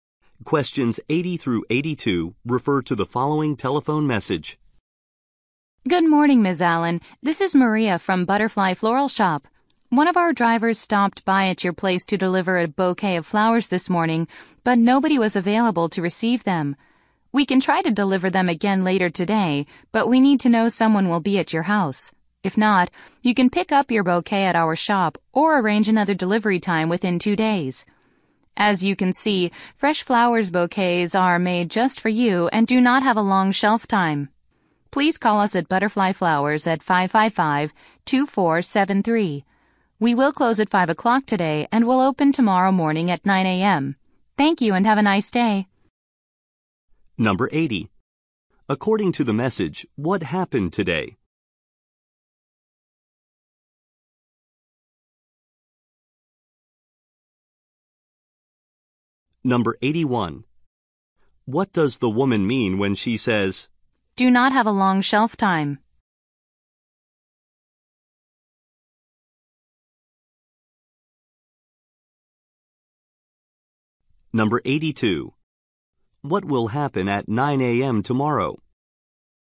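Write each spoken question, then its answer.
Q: According to the message, what happened today?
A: A flower delivery failed because nobody was home

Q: What does the woman mean when she says,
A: The flowers will not stay fresh for long

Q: What will happen at 9 a.m.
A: The shop will open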